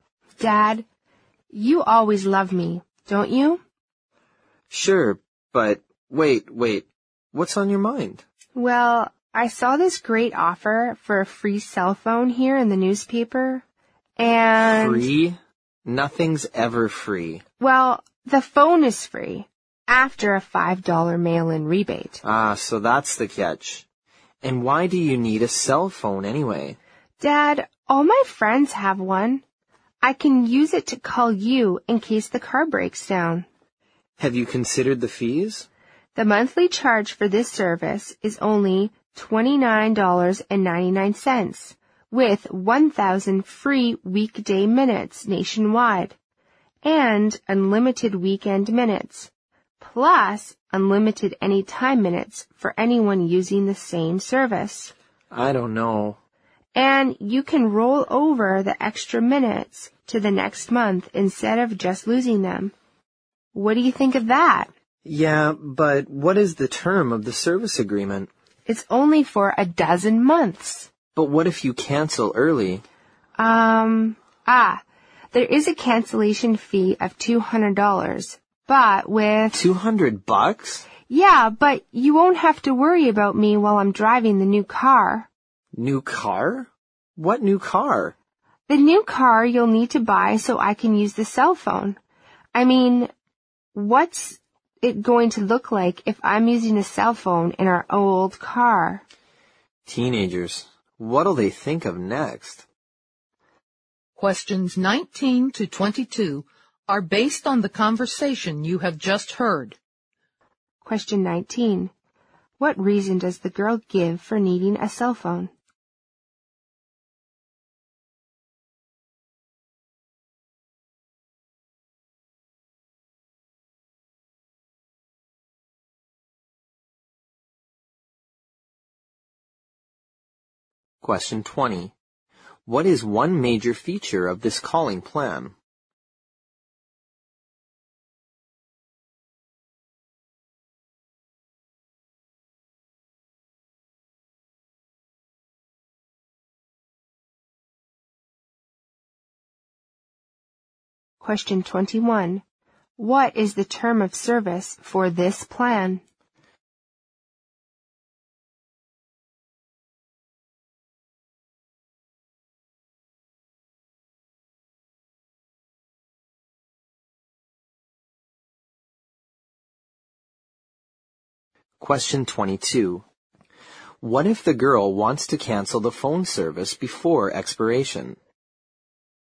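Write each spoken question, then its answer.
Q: What reason does the girl give for needing a cell phone?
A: To call her dad if the car breaks down

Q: What is the term of service for this plan?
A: 12 months

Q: What if the girl wants to cancel the phone service before expiration?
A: She must pay a $200 cancellation fee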